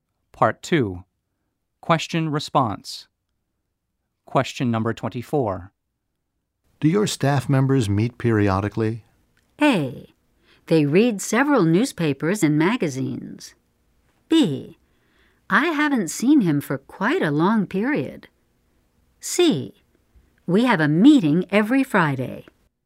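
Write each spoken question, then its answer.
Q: Do your staff members meet periodically?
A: C: We have a meeting every Friday.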